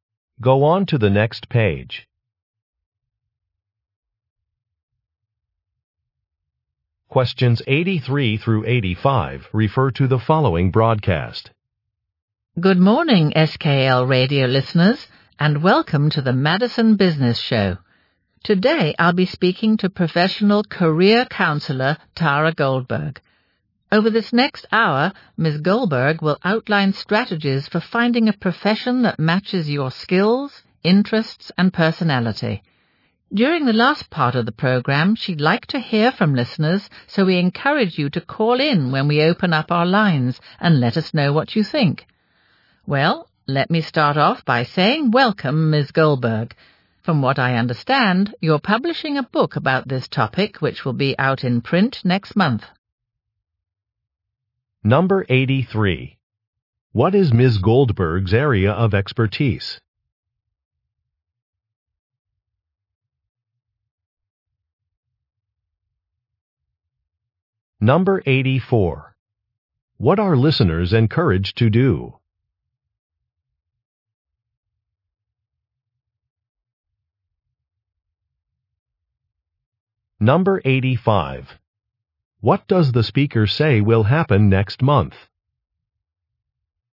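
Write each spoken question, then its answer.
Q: What is Ms. Goldberg's area of expertise?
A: Career counseling

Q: What are listeners encouraged to do?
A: Call in to the show

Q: What does the speaker say will happen next month?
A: Ms. Goldberg's book will be published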